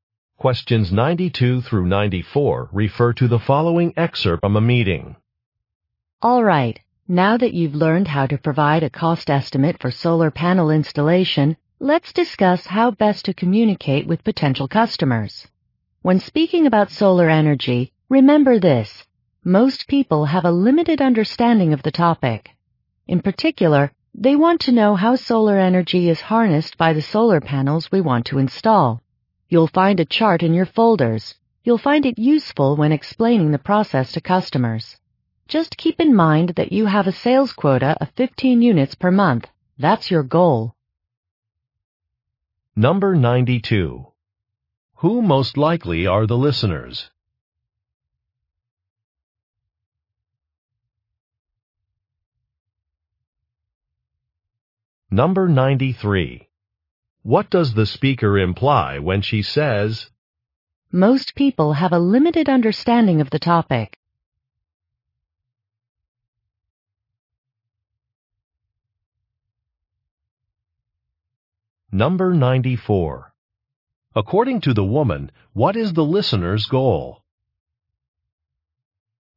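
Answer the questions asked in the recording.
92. Solar panel salespeople
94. To sell 15 units per month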